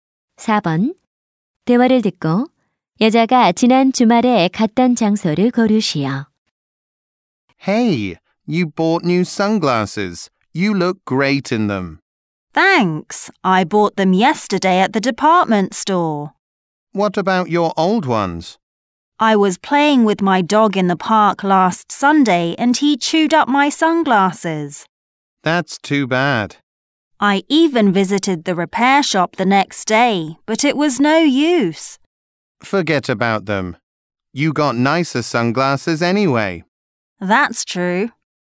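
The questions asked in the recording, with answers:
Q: 대화를 듣고 여자가 지난 주말에 갔던 장소를 고르시오.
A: 공원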